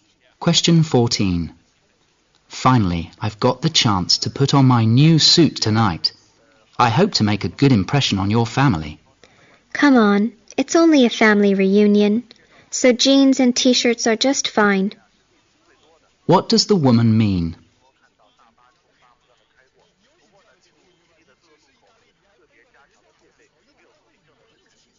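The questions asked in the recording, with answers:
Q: What does the woman mean?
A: The man doesn't need to dress so formally; casual clothes are fine for the family reunion.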